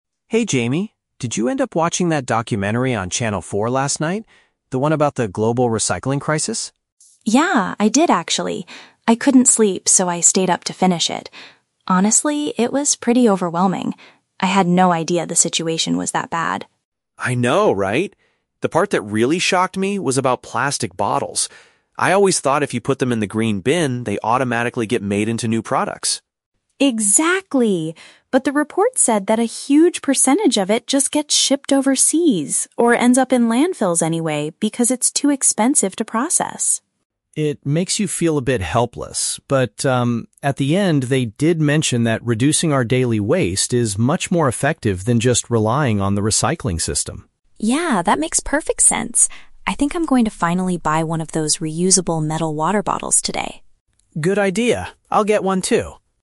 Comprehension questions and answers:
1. Why did Jamie watch the documentary last night?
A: He had trouble falling asleep so he stayed awake.

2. What surprising fact did the friends learn from the TV report?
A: A large amount of collected plastic is actually buried or sent to other countries.

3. What does Jamie decide to do as a result of the documentary?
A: He intends to purchase a sustainable container for his drinks.

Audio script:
Alex: Hey, Jamie. Did you end up watching that documentary on Channel 4 last night? The one about the global recycling crisis?
Jamie: Yeah, I did actually. I couldn't sleep, so I stayed up to finish it. Honestly, it was pretty overwhelming. I had no idea the situation was that bad.
Alex: I know, right? The part that really shocked me was about plastic bottles. I always thought if you put them in the green bin, they automatically get made into new products.
Jamie: Exactly! But the report said that a huge percentage of it just gets shipped overseas or ends up in landfills anyway because it's too expensive to process.
Alex: It makes you feel a bit helpless. But, um, at the end, they did mention that reducing our daily waste is much more effective than just relying on the recycling system.
Jamie: Yeah, that makes perfect sense. I think I'm going to finally buy one of those reusable metal water bottles today.